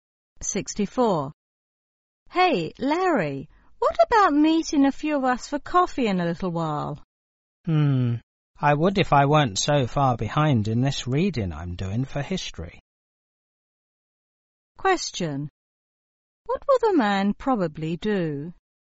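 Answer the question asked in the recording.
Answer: Keep doing his history reading instead of going for coffee.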